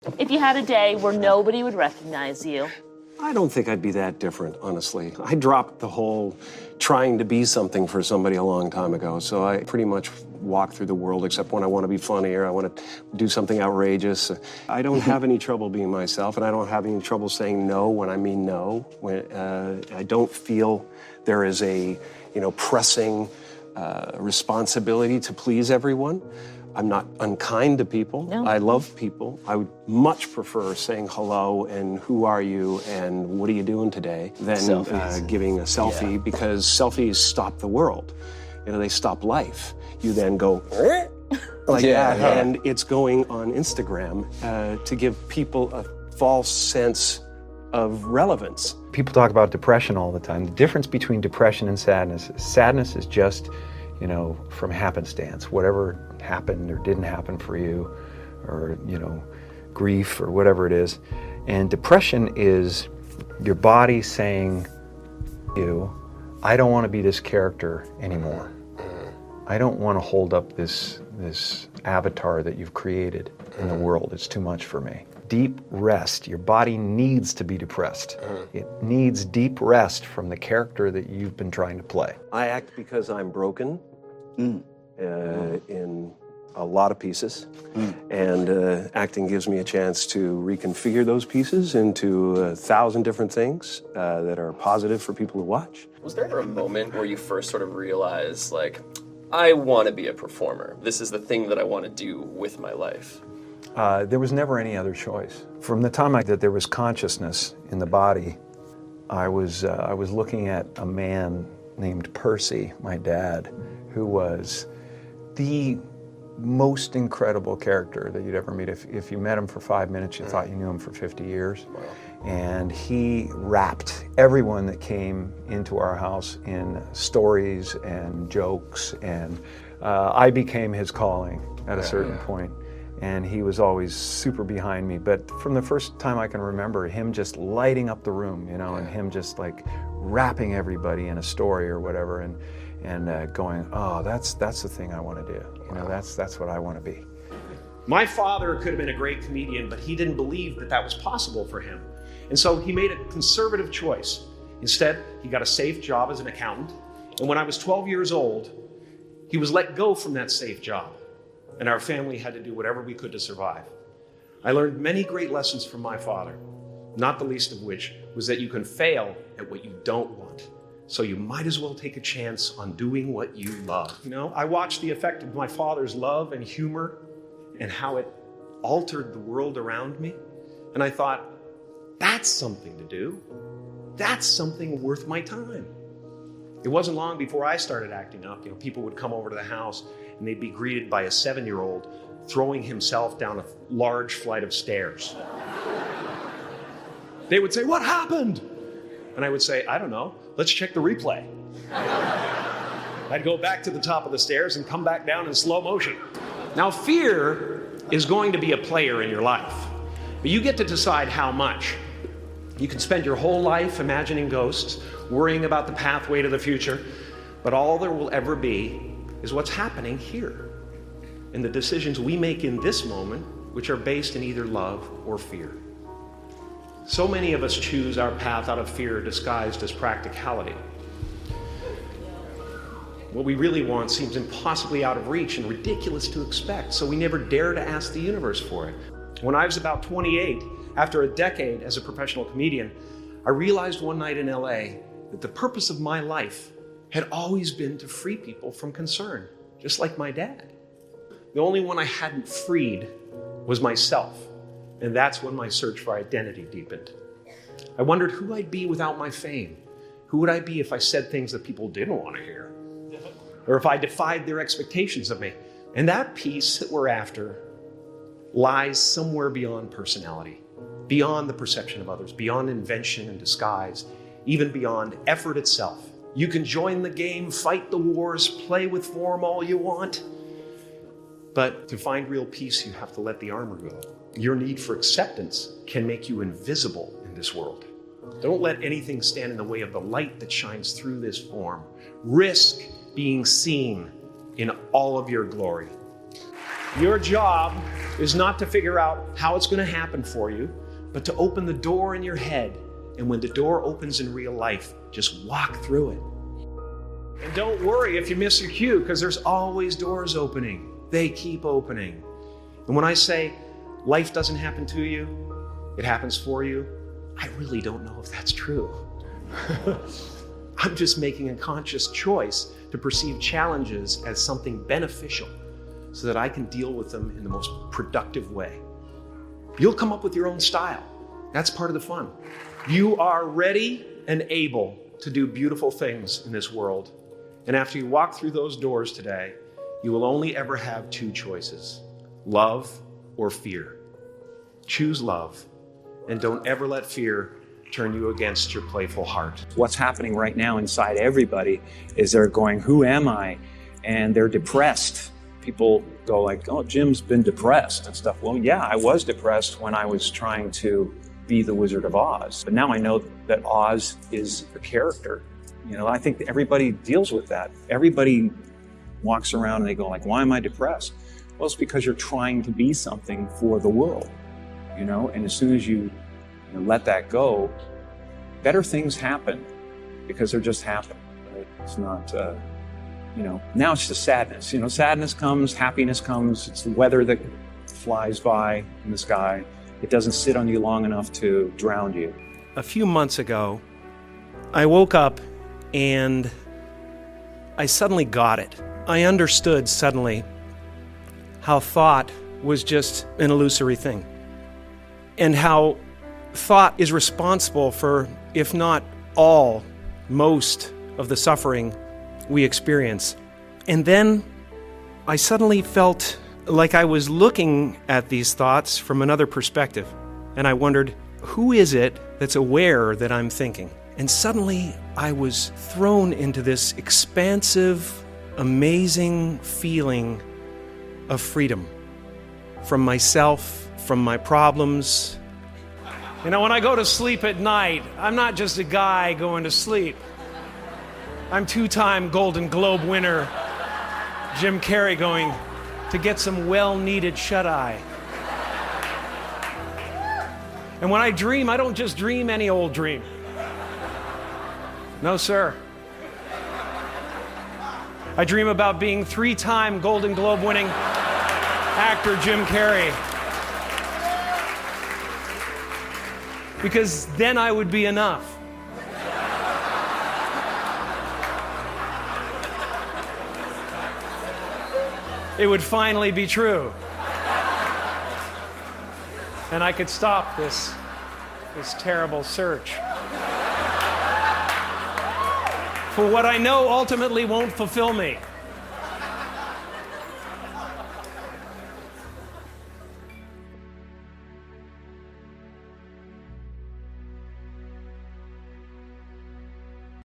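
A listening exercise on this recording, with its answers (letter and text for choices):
Выберите правильный вариант.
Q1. What would Jim Carrey do if nobody recognized him for a day?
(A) He would probably behave almost the same way.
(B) He would completely change his personality.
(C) He would avoid talking to anyone.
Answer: (A) He would probably behave almost the same way.

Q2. Why does Jim Carrey prefer saying hello to taking selfies?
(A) Because selfies stop life and create a false sense of relevance.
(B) Because he doesn't like cameras.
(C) Because he thinks all fans are unkind.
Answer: (A) Because selfies stop life and create a false sense of relevance.

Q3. How does Jim Carrey explain depression in the video?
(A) As a body that needs deep rest from the character a person is trying to play.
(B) As a feeling that appears only when someone is lazy.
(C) As a problem caused only by other people's opinions.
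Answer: (A) As a body that needs deep rest from the character a person is trying to play.

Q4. Why does Jim Carrey say he acts?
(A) Because acting helps him reconfigure his broken pieces into something positive.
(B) Because acting is the easiest way to become rich.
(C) Because acting allows him to avoid talking about himself.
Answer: (A) Because acting helps him reconfigure his broken pieces into something positive.

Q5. Who inspired Jim Carrey to become a performer?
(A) His father, who could light up the room with stories and jokes.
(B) His school teacher, who made him perform on stage.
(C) His friend, who invited him to a comedy club.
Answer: (A) His father, who could light up the room with stories and jokes.

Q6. What lesson did Jim Carrey learn from his father's experience?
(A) You can fail at what you don't want, so you might as well do what you love.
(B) A safe job always protects you from failure.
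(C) It is better not to take risks in life.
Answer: (A) You can fail at what you don't want, so you might as well do what you love.

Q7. According to Jim Carrey, what are many people's choices based on?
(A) Fear disguised as practicality.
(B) A clear understanding of their dreams.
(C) A desire to become famous quickly.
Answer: (A) Fear disguised as practicality.

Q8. Where does Jim Carrey say real peace can be found?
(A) Beyond personality, other people's perception, invention, and disguise.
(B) In becoming more famous and successful.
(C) In always meeting other people's expectations.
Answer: (A) Beyond personality, other people's perception, invention, and disguise.

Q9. What does Jim Carrey advise people to choose?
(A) Love instead of fear.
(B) Fame instead of privacy.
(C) Safety instead of creativity.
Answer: (A) Love instead of fear.

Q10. What does Jim Carrey say about challenges?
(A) He chooses to see them as something beneficial so he can deal with them productively.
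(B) He believes challenges should always be avoided.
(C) He thinks challenges prove that life is unfair.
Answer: (A) He chooses to see them as something beneficial so he can deal with them productively.

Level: Intermediate, или B1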